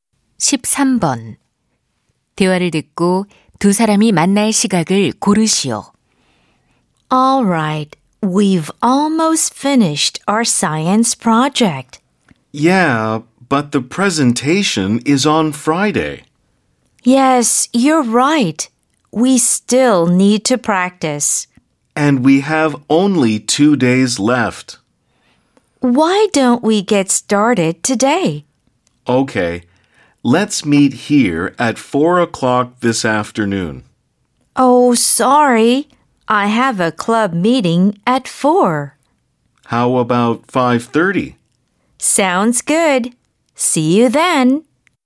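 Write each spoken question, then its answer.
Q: 대화를 듣고 두 사람이 만날 시각을 고르시오.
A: 5시 30분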